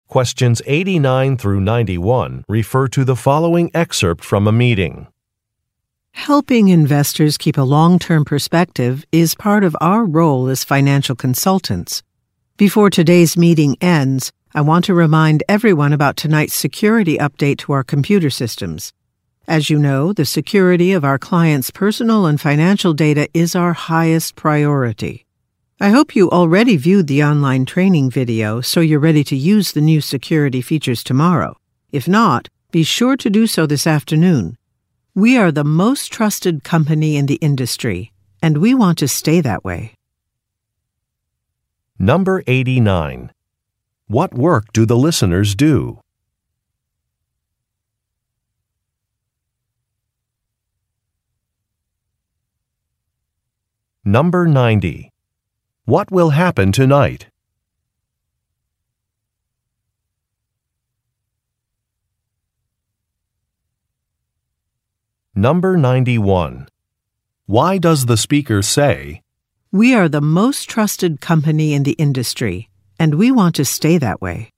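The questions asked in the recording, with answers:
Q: What work do the listeners do?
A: They are financial consultants.

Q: What will happen tonight?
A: A security update to the computer systems.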